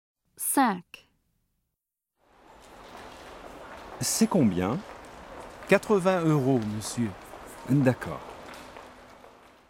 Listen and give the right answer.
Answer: 80 euros.